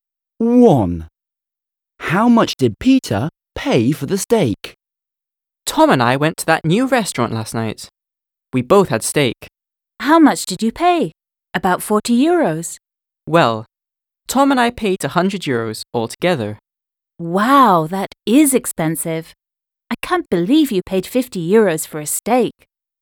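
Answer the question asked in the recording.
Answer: 50 euros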